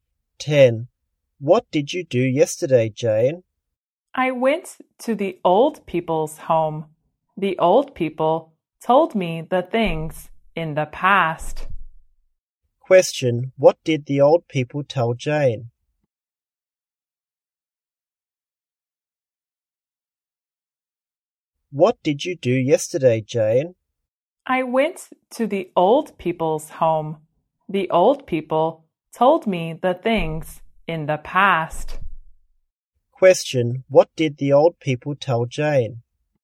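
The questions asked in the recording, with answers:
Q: what did the old people tell Jane?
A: The things in the past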